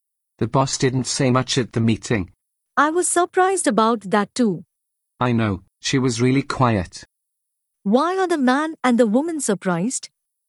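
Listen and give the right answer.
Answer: The boss didn't say much at the meeting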